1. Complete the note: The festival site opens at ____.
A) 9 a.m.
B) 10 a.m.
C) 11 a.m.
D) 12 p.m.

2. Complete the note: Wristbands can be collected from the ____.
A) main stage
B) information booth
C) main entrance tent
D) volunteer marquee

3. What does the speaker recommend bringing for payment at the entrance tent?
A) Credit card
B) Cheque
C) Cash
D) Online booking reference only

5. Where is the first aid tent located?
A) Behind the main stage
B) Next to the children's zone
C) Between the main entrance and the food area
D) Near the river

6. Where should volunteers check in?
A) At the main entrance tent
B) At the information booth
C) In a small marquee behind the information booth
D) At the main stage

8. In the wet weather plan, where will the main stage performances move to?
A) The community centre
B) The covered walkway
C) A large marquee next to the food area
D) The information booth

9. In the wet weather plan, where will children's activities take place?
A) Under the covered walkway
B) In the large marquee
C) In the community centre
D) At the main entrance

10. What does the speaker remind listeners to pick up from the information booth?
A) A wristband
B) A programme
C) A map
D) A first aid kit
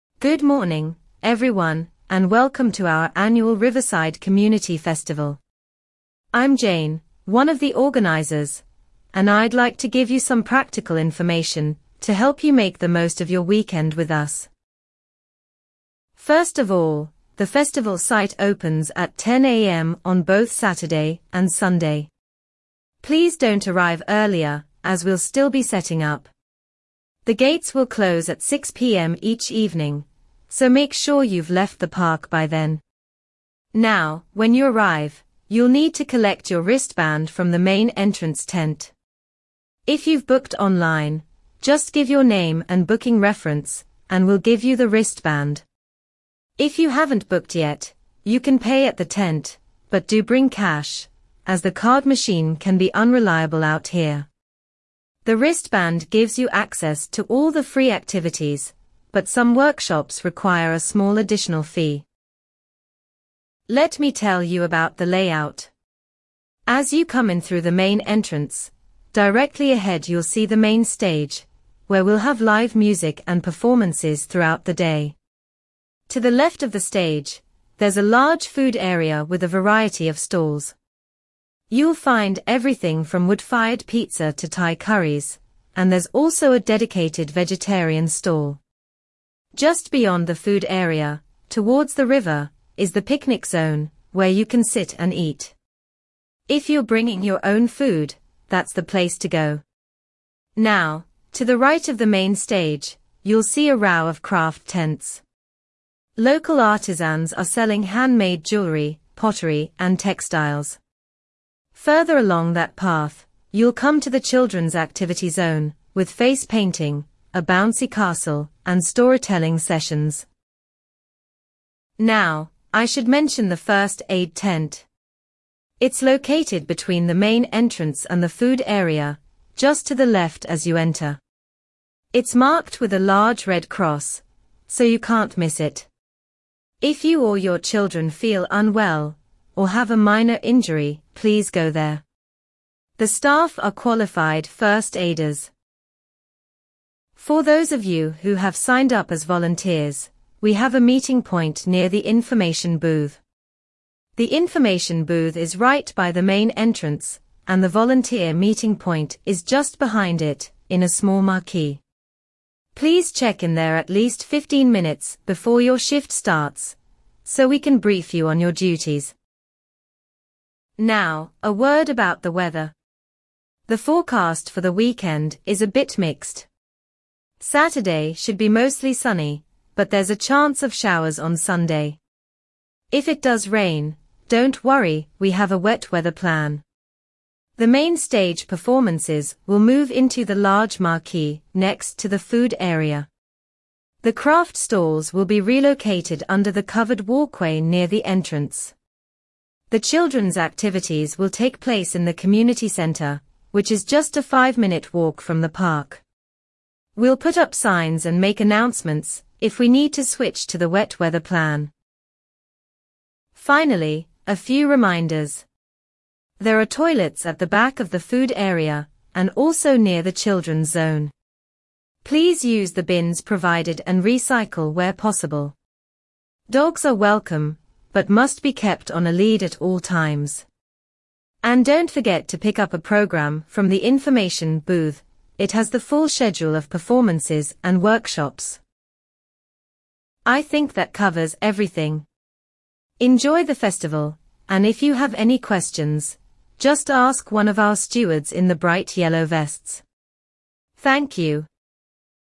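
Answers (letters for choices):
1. B
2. C
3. C
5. C
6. C
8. C
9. C
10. B

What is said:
Good morning, everyone, and welcome to our annual Riverside Community Festival. I'm Jane, one of the organisers, and I'd like to give you some practical information to help you make the most of your weekend with us.
First of all, the festival site opens at 10 a.m. on both Saturday and Sunday. Please don't arrive earlier, as we'll still be setting up. The gates will close at 6 p.m. each evening, so make sure you've left the park by then. Now, when you arrive, you'll need to collect your wristband from the main entrance tent. If you've booked online, just give your name and booking reference, and we'll give you the wristband. If you haven't booked yet, you can pay at the tent, but do bring cash, as the card machine can be unreliable out here. The wristband gives you access to all the free activities, but some workshops require a small additional fee.
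Let me tell you about the layout. As you come in through the main entrance, directly ahead you'll see the main stage, where we'll have live music and performances throughout the day. To the left of the stage, there's a large food area with a variety of stalls. You'll find everything from wood-fired pizza to Thai curries, and there's also a dedicated vegetarian stall. Just beyond the food area, towards the river, is the picnic zone, where you can sit and eat. If you're bringing your own food, that's the place to go. Now, to the right of the main stage, you'll see a row of craft tents. Local artisans are selling handmade jewellery, pottery, and textiles. Further along that path, you'll come to the children's activity zone, with face painting, a bouncy castle, and storytelling sessions.
Now, I should mention the first aid tent. It's located between the main entrance and the food area, just to the left as you enter. 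It's marked with a large red cross, so you can't miss it. If you or your children feel unwell or have a minor injury, please go there. The staff are qualified first aiders.
For those of you who have signed up as volunteers, we have a meeting point near the information booth. The information booth is right by the main entrance, and the volunteer meeting point is just behind it, in a small marquee. Please check in there at least 15 minutes before your shift starts, so we can brief you on your duties.
Now, a word about the weather. The forecast for the weekend is a bit mixed. Saturday should be mostly sunny, but there's a chance of showers on Sunday. If it does rain, don't worry - we have a wet weather plan. The main stage performances will move into the large marquee next to the food area. The craft stalls will be relocated under the covered walkway near the entrance. The children's activities will take place in the community centre, which is just a five-minute walk from the park. 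We'll put up signs and make announcements if we need to switch to the wet weather plan.
Finally, a few reminders. There are toilets at the back of the food area and also near the children's zone. Please use the bins provided and recycle where possible. Dogs are welcome but must be kept on a lead at all times. And don't forget to pick up a programme from the information booth - it has the full schedule of performances and workshops.
I think that covers everything. Enjoy the festival, and if you have any questions, just ask one of our stewards in the bright yellow vests. Thank you.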